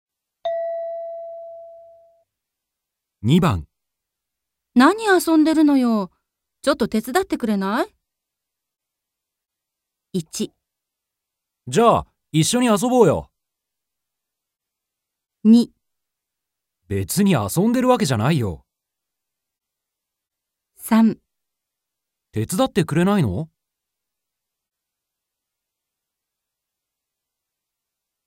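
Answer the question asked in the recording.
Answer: 別に遊んでるわけじゃないよ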